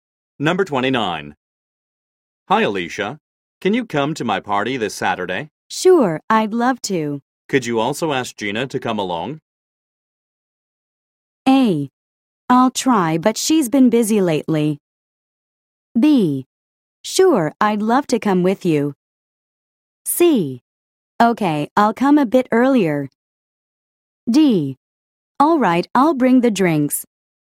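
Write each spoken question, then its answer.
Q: Could you also ask Gina to come along?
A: A: I'll try, but she's been busy lately.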